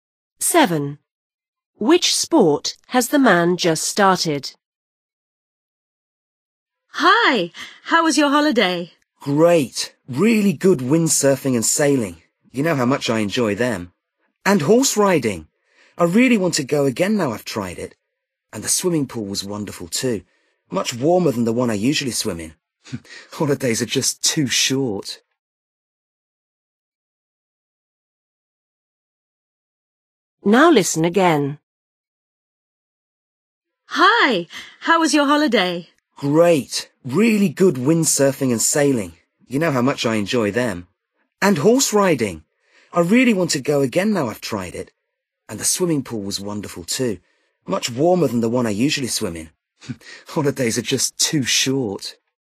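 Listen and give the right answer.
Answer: Horse riding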